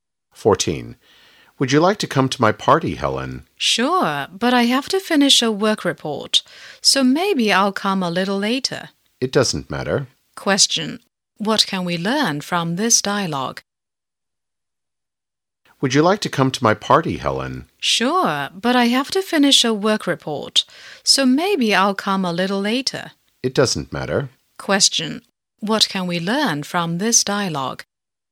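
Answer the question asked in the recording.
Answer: Helen will come to the party a little late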